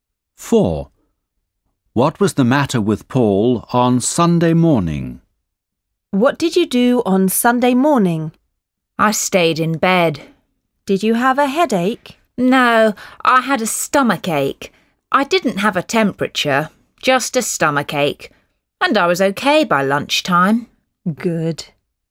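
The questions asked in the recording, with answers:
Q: What was the matter with Paul on Sunday morning?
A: He had a stomach ache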